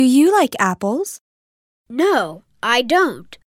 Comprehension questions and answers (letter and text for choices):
«با توجه به فایل صوتی گزینه مناسب را انتخاب کنید»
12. Does he like apples?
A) Yes, he likes apples.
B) No, he doesn't like apples.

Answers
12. B) No, he doesn't like apples.